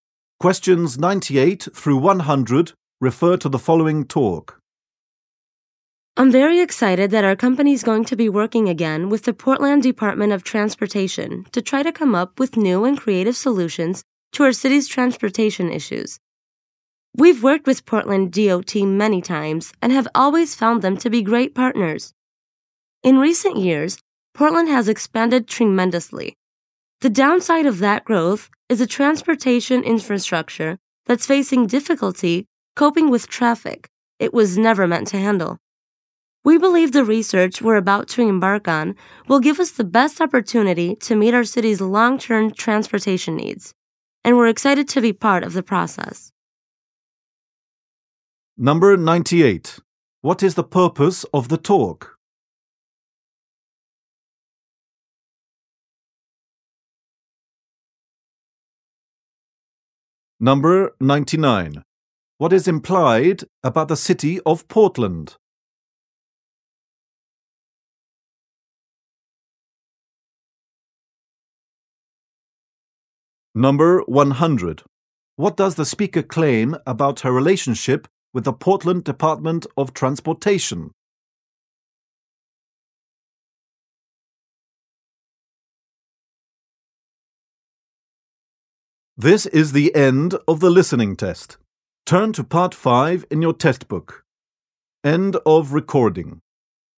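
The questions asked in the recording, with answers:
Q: What is the purpose of the talk?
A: To announce a project with the Portland Department of Transportation

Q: What is implied about the city of Portland?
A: It has grown rapidly and its transportation is strained

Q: What does the speaker claim about her relationship with the Portland Department of Transportation?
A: They have worked together many times and are great partners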